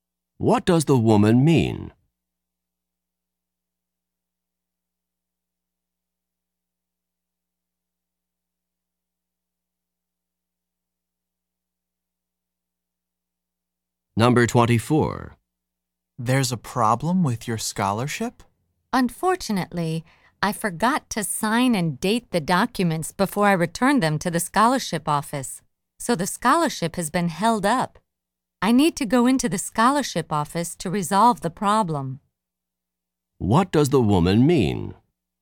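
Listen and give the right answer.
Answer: Her scholarship is delayed because she didn't sign and date the documents.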